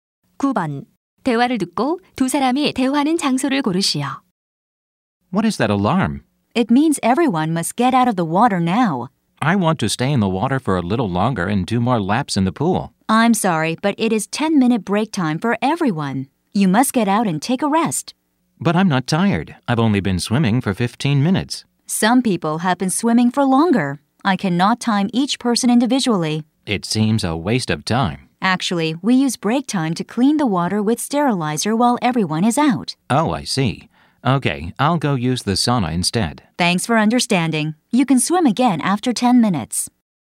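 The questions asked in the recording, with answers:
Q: 대화를 듣고 두 사람이 대화하는 장소를 고르시오.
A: 수영장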